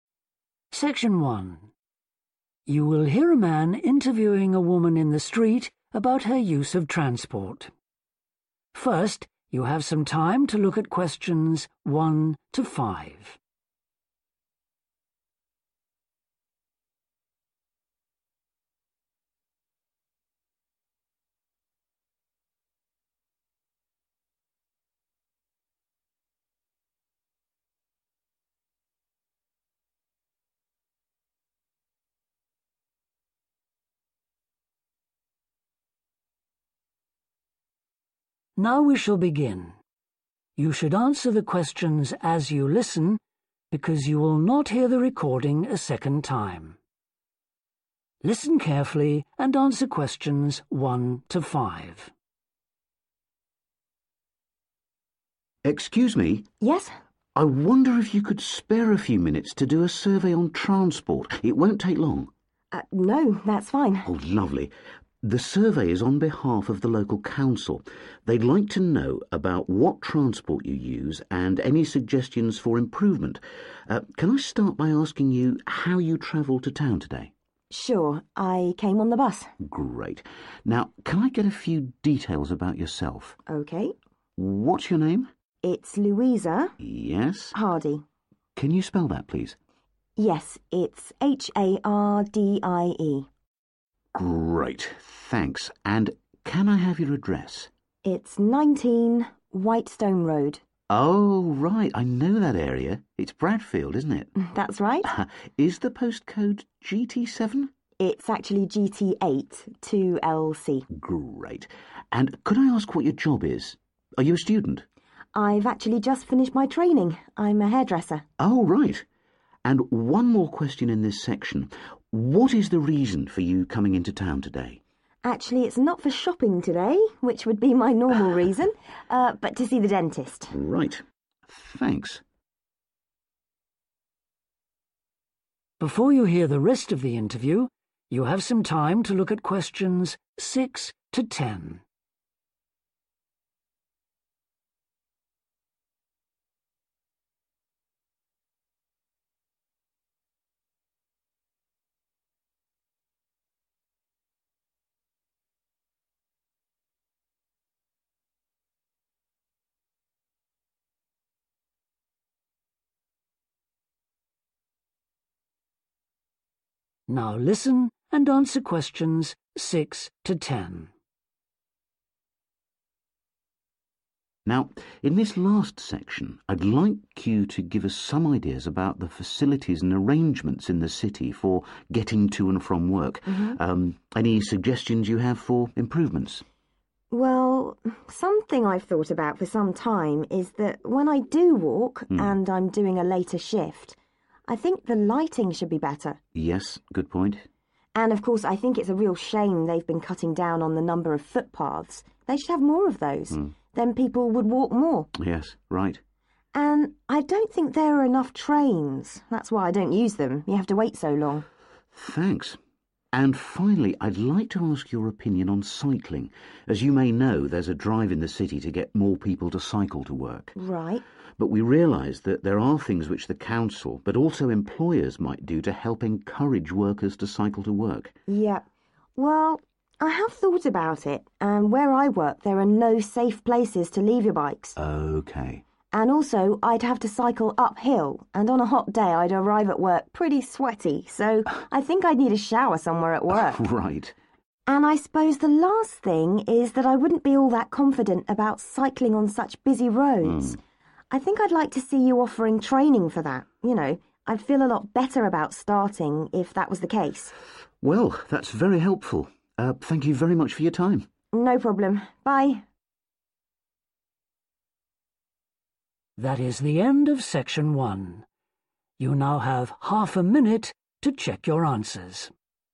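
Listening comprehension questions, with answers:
Complete the notes below. Write ONE WORD for each answer.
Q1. Name: Luisa 1 .................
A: Hardie

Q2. Address: 2.................... White Stone Rd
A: 19

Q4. Occupation: 4..............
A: hairdresser

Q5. Reason for a visit to town: to go to the 5..............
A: dentist

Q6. - better 6..............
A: lighting

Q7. - more frequent 7..................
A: trains

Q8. - having 8................. parking places for bicycles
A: safe

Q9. - being able to use a 9.............. at work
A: shower

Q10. - the opportunity to have cycling 10.............. on busy roads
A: training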